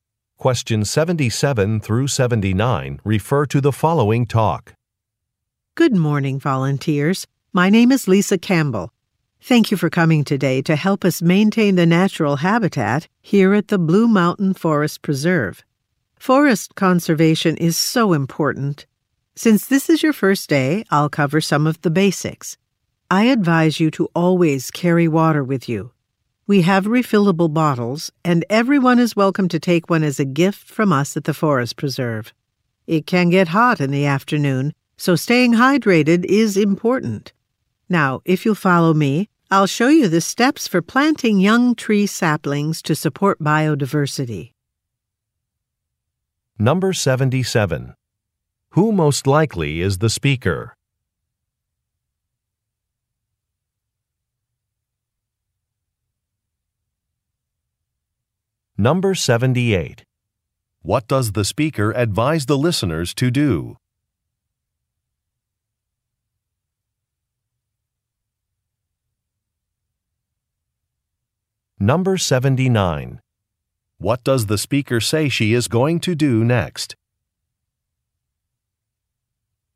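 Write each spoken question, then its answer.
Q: What does the speaker advise the listeners to do?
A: Always carry water

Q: What does the speaker say she is going to do next?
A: Show how to plant young tree saplings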